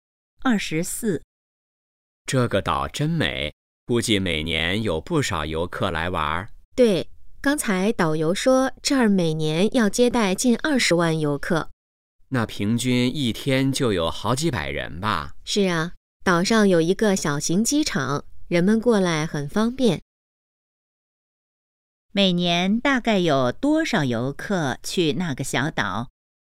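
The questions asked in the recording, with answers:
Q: 每年大概有多少游客去那个小岛?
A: 近20万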